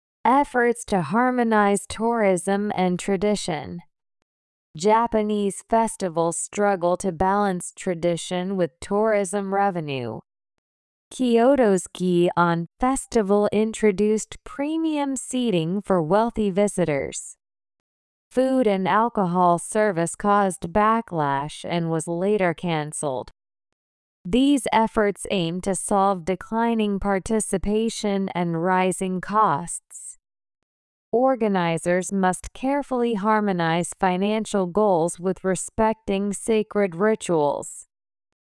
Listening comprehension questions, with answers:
次の各質問の答えを探しながら聞きましょう。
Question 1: What challenge do Japanese festivals face?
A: Balancing tradition with tourism revenue.

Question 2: How does Gion Festival address the issue?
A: By introducing premium seating for wealthy tourists.

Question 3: Why was food and alcohol service later canceled?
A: Because it caused backlash.

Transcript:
Efforts to Harmonize Tourism and Tradition.
Japanese festivals struggle to balance tradition with tourism revenue.
Kyoto's Gion Festival introduced premium seating for wealthy visitors.
Food and alcohol service caused backlash and was later canceled.
These efforts aim to solve declining participation and rising costs.
Organizers must carefully harmonize financial goals with respecting sacred rituals.